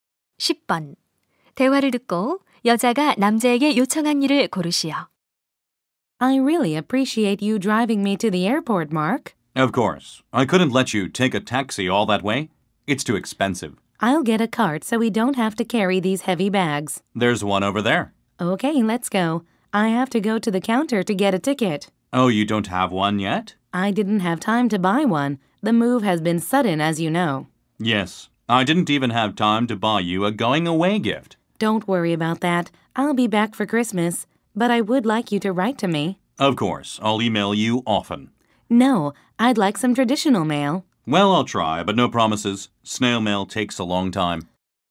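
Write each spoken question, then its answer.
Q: 대화를 듣고 여자가 남자에게 요청한 일을 고르시오.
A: 우편으로 편지 쓰기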